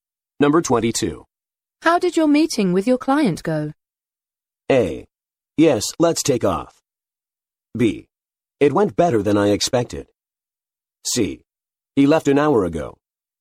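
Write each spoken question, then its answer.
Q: How did your meeting with your client go?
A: B: It went better than I expected.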